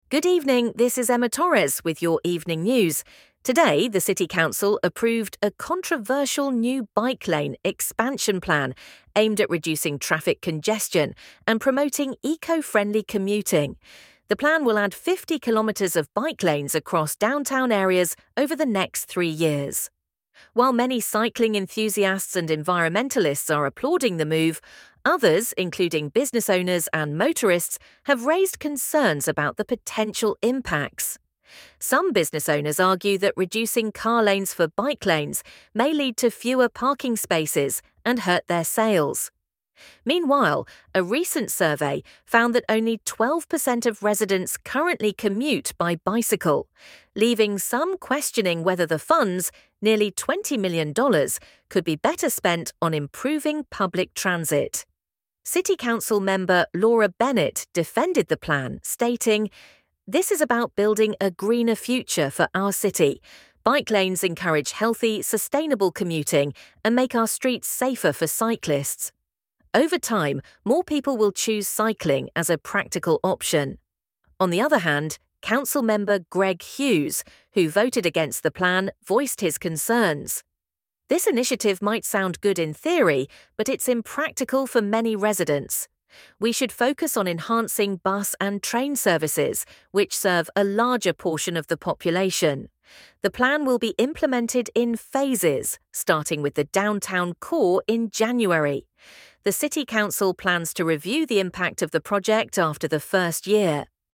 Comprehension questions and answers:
Complete the following statements based on the news report:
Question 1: The bike lane expansion plan is expected to add ______ over the next three years.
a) new buses to public transit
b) 50 kilometers of bike lanes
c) more parking spaces downtown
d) new train routes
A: 50 kilometers of bike lanes

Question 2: Some business owners are concerned that the plan will ______.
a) reduce car lanes and parking spaces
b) encourage healthier commuting options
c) improve public transit services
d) promote cycling as a practical option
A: reduce car lanes and parking spaces

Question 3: Council Member Laura Bennett supports the bike lane plan because she believes it will ______.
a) attract more motorists to the downtown area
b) create a greener and safer city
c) increase train services for commuters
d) reduce the cityâ€TMs budget deficit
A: create a greener and safer city

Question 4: Council Member Greg Hughes suggests that the city should focus on ______.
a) expanding train and bus services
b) building additional car parking spaces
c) improving existing bike lanes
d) increasing the number of cyclists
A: expanding train and bus services

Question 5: The City Council plans to review the projectâ€TMs impact ______.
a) at the start of the third year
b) before starting the downtown phase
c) after the first year of implementation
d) once the $20 million budget is exceeded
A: after the first year of implementation

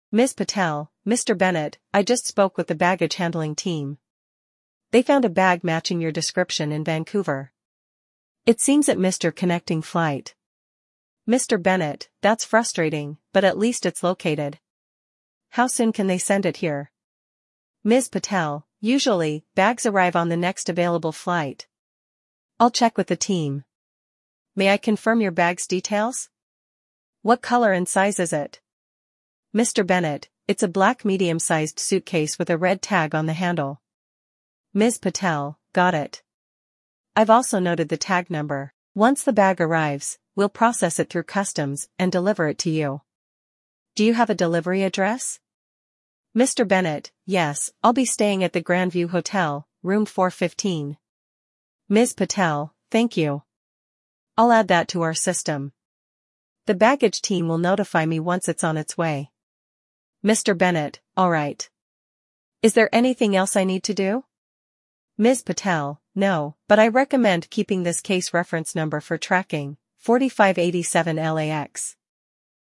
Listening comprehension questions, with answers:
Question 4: Where was Mr. Bennett's luggage found?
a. In Toronto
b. At the Grandview Hotel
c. In Vancouver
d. In customs at his destination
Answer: In Vancouver

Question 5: What unique feature does Mr. Bennett mention about his suitcase?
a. A yellow handle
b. A red tag on the handle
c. A blue stripe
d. A combination lock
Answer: A red tag on the handle

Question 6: What reference number does Ms. Patel provide for tracking?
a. AC123456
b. 4587LAX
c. 308YYZ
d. 415GND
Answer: 4587LAX

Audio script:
Ms. Patel: Mr. Bennett, I just spoke with the baggage handling team. They found a bag matching your description in Vancouver. It seems it missed your connecting flight.
Mr. Bennett: That's frustrating, but at least it's located. How soon can they send it here?
Ms. Patel: Usually, bags arrive on the next available flight. I'll check with the team. May I confirm your bag's details? What color and size is it?
Mr. Bennett: It's a black medium-sized suitcase with a red tag on the handle.
Ms. Patel: Got it. I've also noted the tag number. Once the bag arrives, we'll process it through customs and deliver it to you. Do you have a delivery address?
Mr. Bennett: Yes, I'll be staying at the Grandview Hotel, Room 415.
Ms. Patel: Thank you. I'll add that to our system. The baggage team will notify me once it's on its way.
Mr. Bennett: Alright. Is there anything else I need to do?
Ms. Patel: No, but I recommend keeping this case reference number for tracking: 4587LAX.

